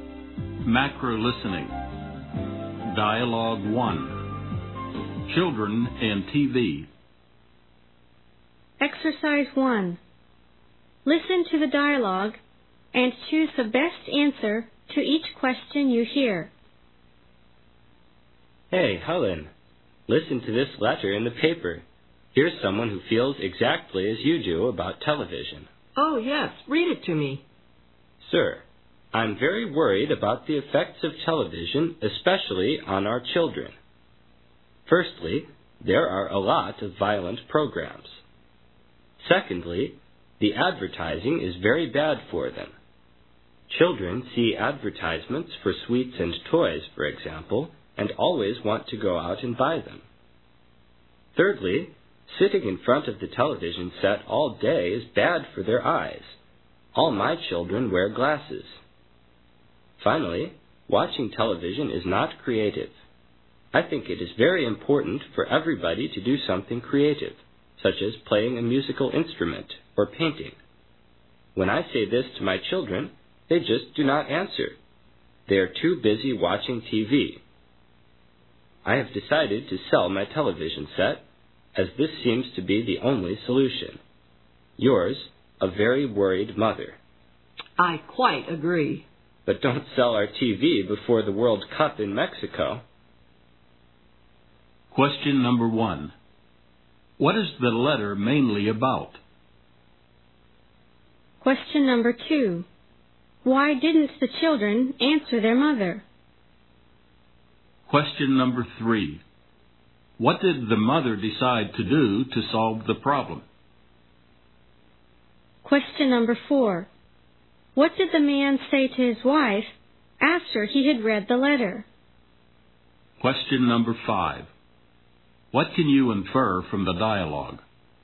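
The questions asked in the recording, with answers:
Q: What is the letter mainly about?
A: The bad effects of television on children

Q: Why didn't the children answer their mother?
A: They were too busy watching TV

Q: What did the mother decide to do to solve the problem?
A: Sell her television set

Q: What did the man say to his wife after he had read the letter?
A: He agreed, but said not to sell their TV before the World Cup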